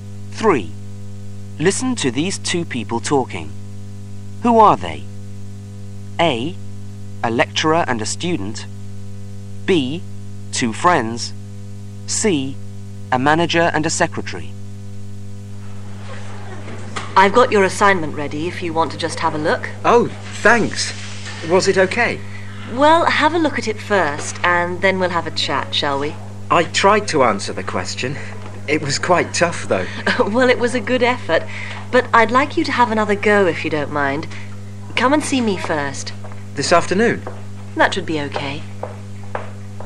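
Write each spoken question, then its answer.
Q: Who are they?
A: A: A lecturer and a student.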